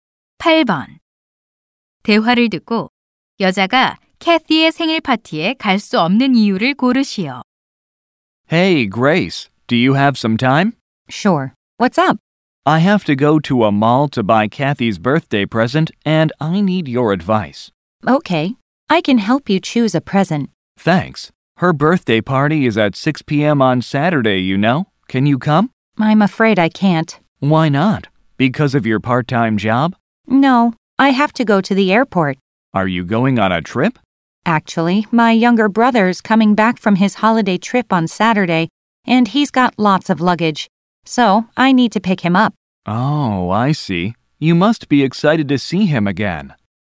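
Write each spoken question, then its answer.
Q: 대화를 듣고 여자가 캐티의 생일 파티에 갈 수 없는 이유를 고르시오.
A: 남동생을 데리러 공항에 가야 해서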